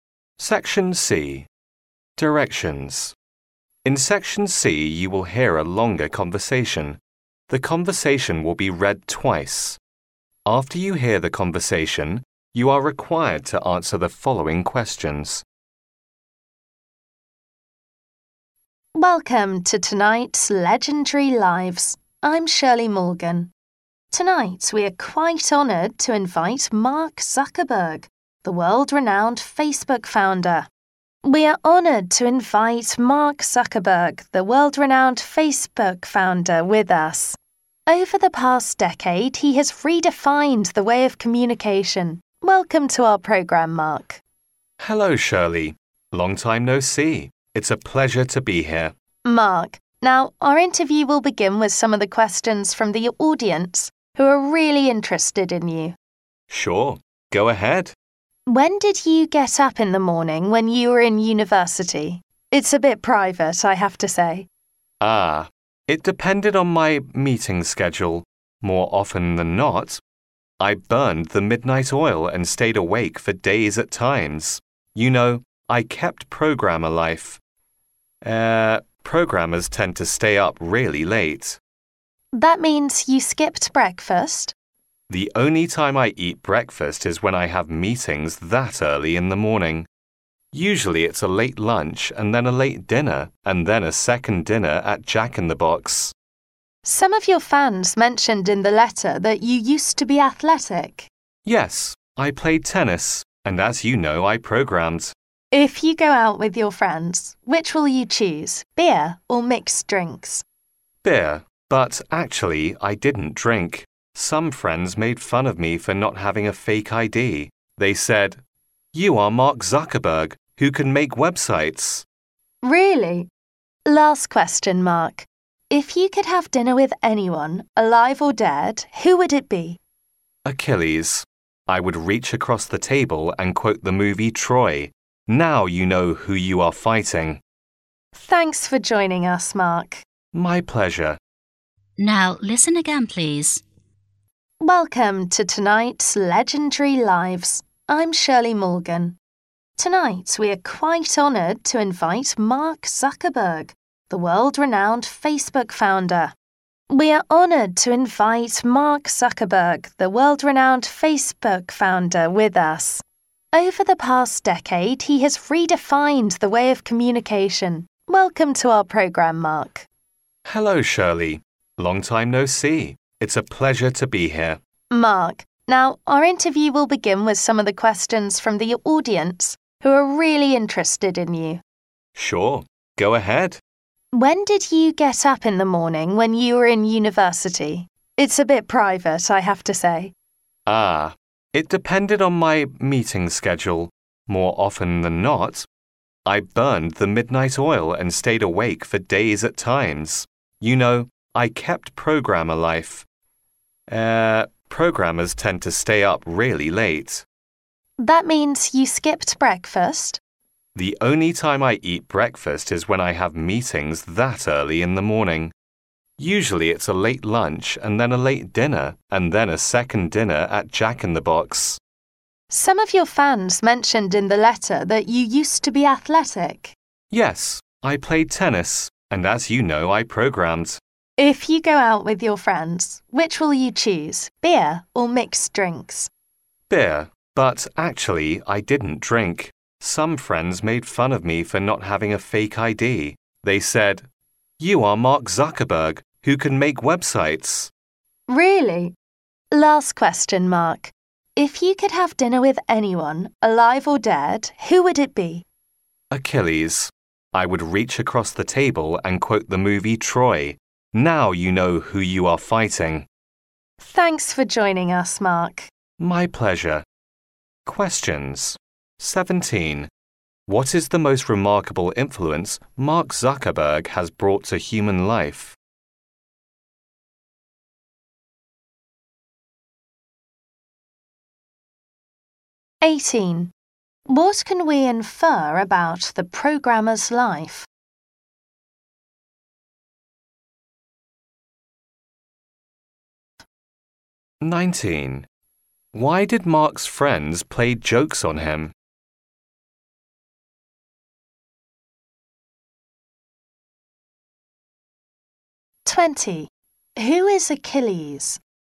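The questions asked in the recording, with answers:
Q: What is the most remarkable influence Mark Zuckerberg has brought to human life?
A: He has redefined the way of communication

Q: What can we infer about the programmer's life?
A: Programmers tend to stay up really late

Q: Why did Mark's friends play jokes on him?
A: Because he didn't have a fake ID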